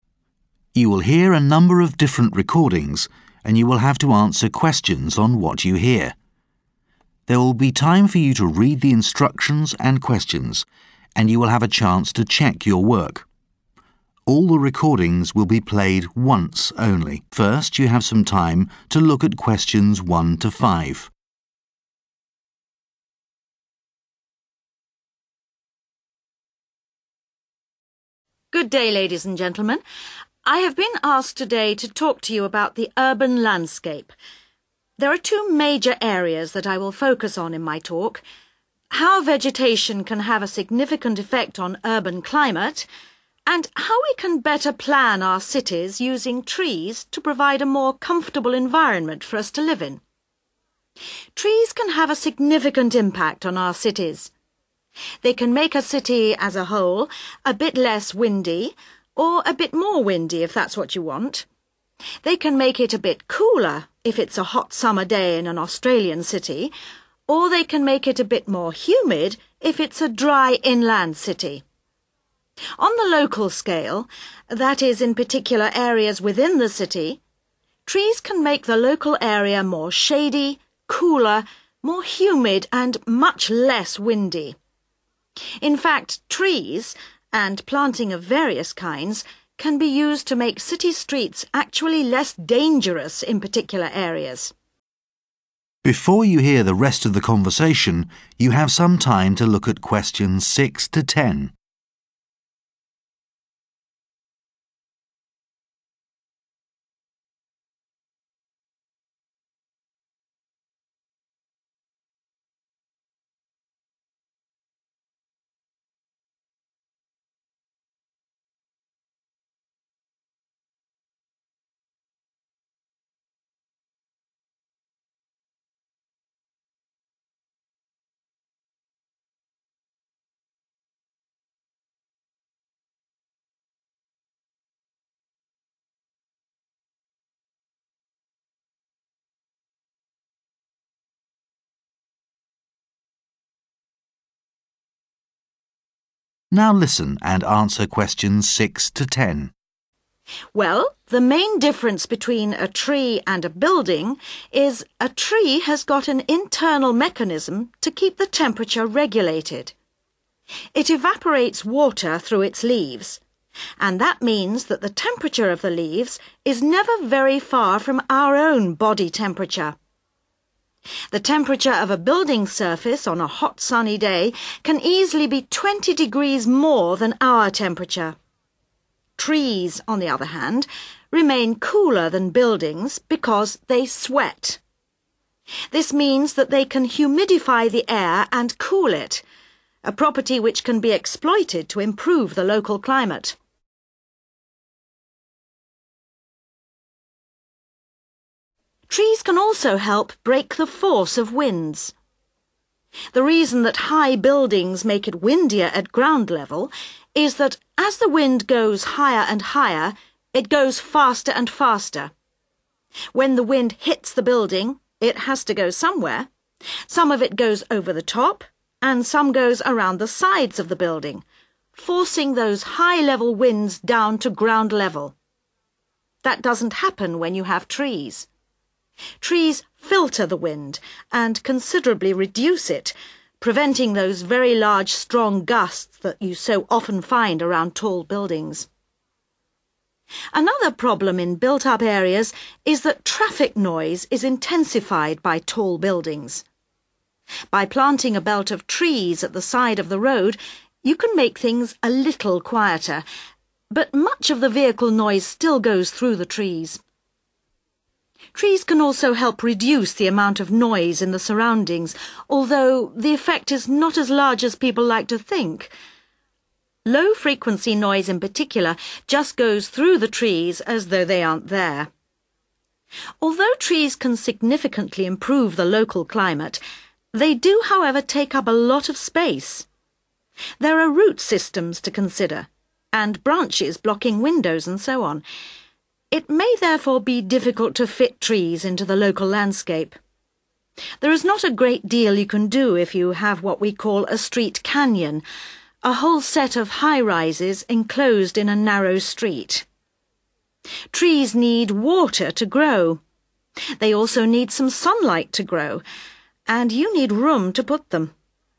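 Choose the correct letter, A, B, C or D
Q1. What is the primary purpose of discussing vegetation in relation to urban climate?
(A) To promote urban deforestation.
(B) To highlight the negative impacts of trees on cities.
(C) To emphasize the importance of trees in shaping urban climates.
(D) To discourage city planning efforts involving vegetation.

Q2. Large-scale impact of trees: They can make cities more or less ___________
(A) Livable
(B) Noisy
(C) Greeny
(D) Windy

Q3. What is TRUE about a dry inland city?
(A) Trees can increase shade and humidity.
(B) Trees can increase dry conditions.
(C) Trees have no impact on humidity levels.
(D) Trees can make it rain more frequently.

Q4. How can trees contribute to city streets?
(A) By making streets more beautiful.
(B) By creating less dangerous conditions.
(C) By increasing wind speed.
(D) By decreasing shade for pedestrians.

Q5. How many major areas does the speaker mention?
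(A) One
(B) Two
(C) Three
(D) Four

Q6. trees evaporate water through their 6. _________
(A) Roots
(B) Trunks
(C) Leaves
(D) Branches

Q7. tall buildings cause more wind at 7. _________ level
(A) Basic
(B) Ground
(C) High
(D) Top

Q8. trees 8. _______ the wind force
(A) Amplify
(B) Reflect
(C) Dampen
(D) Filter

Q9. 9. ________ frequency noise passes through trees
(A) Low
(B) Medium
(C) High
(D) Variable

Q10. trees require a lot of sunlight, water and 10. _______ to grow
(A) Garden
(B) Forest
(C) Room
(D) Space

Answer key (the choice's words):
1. To emphasize the importance of trees in shaping urban climates.
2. Windy
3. Trees can increase shade and humidity.
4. By creating less dangerous conditions.
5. Two
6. Leaves
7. Ground
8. Filter
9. Low
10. Room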